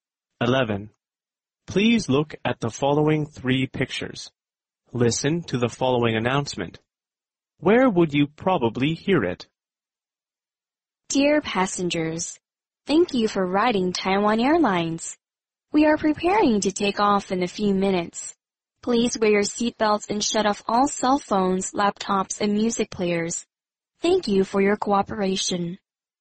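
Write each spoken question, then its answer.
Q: Where would you probably hear it?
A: On an airplane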